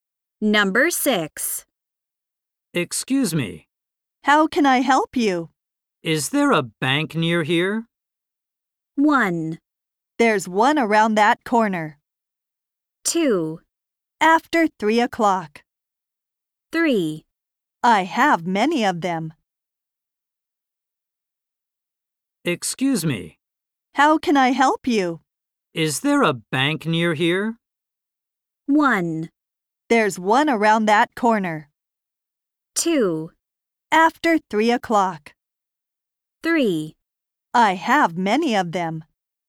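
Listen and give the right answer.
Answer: 1: There's one around that corner.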